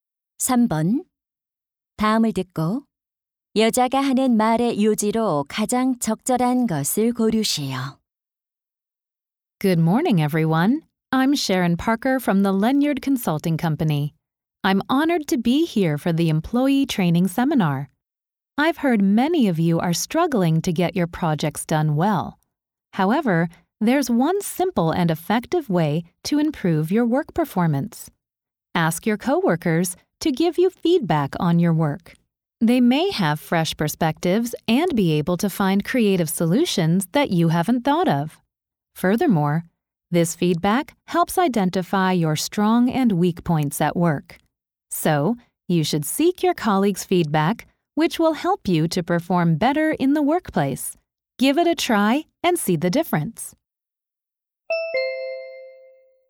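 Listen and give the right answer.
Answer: 동료의 피드백을 구하면 업무 성과를 높일 수 있다.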